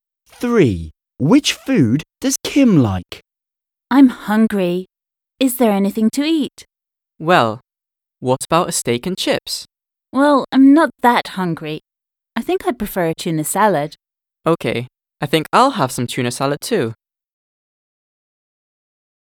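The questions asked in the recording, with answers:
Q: Which food does Kim like?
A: tuna salad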